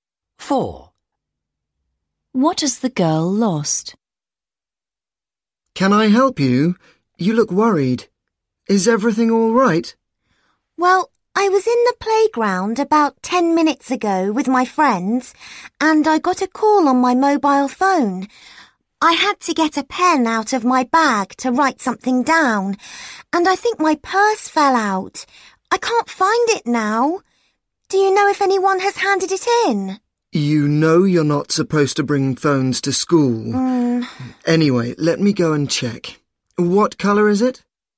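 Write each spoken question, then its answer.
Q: What has the girl lost?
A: Her purse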